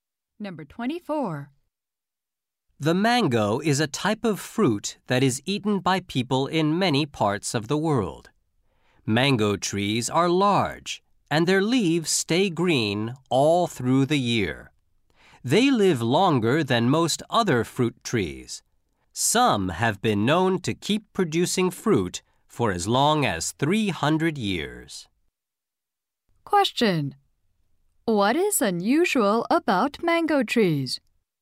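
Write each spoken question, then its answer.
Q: What is unusual about mango trees?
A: They live longer than most other fruit trees.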